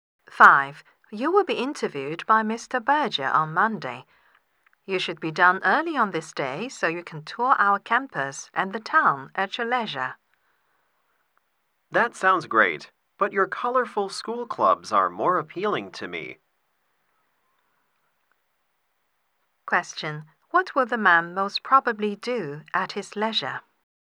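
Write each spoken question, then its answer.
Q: What will the man most probably do at his leisure?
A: Visit the school clubs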